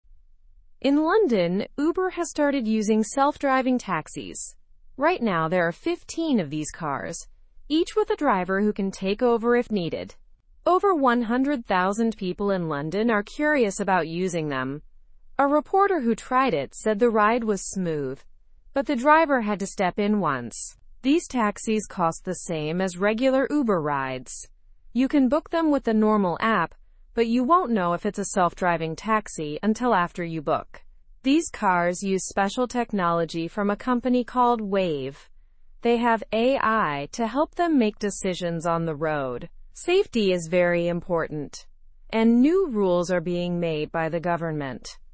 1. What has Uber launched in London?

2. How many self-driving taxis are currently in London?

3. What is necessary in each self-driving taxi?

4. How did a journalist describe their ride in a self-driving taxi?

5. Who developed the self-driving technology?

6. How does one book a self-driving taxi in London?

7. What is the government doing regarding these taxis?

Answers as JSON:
{"1": "Self-driving taxis.", "2": "There are 15 self-driving taxis.", "3": "A human safety driver.", "4": "The ride was described as smooth.", "5": "The technology was developed by Wayve.", "6": "By using the regular Uber app.", "7": "They are working on new regulations."}

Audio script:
In London, Uber has started using self-driving taxis. Right now, there are 15 of these cars, each with a driver who can take over if needed. Over 100,000 people in London are curious about using them. A reporter who tried it said the ride was smooth, but the driver had to step in once. These taxis cost the same as regular Uber rides. You can book them with the normal app, but you won't know if it's a self-driving taxi until after you book. These cars use special technology from a company called Wayve. They have AI to help them make decisions on the road. Safety is very important, and new rules are being made by the government.

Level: (Level 2)